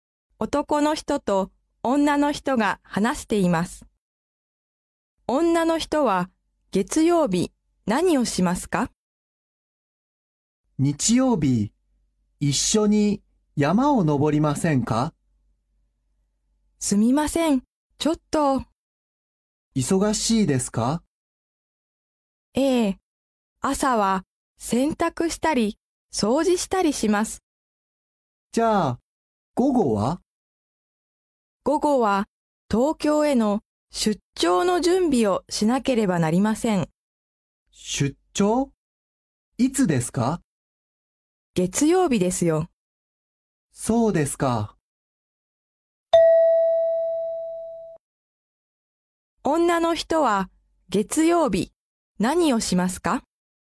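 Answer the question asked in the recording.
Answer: 東京へ出張する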